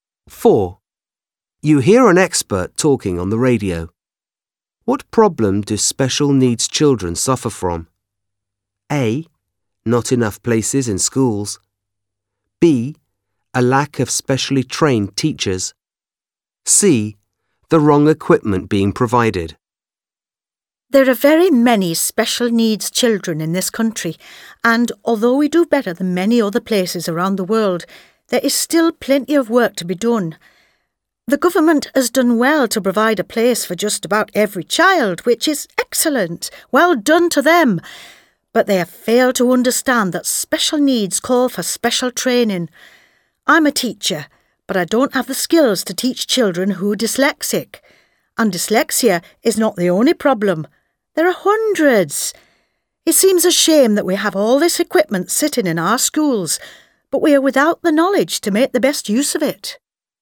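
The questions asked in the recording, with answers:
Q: What problem do special needs children suffer from?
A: B: A lack of specially trained teachers.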